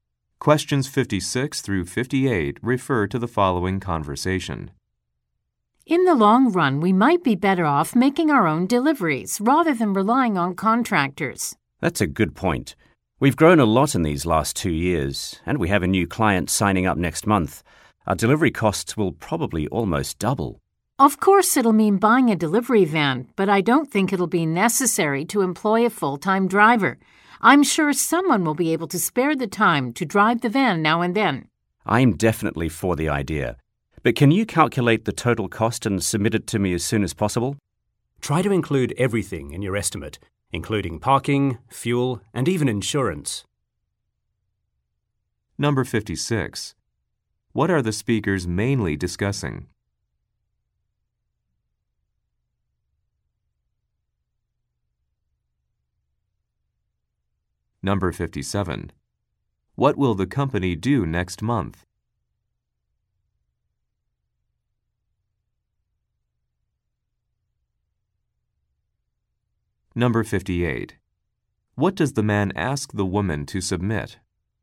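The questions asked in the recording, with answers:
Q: What are the speakers mainly discussing?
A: Making their own deliveries instead of using contractors

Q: What will the company do next month?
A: Sign up a new client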